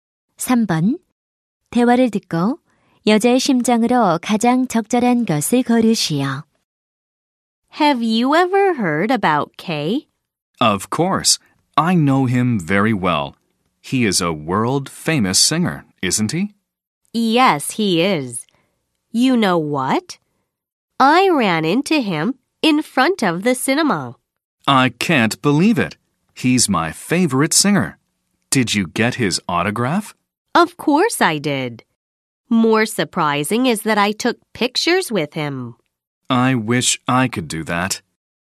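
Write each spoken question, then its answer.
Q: 대화를 듣고 여자의 심정으로 가장 적절한 것을 고르시오.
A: 신남 (기쁨)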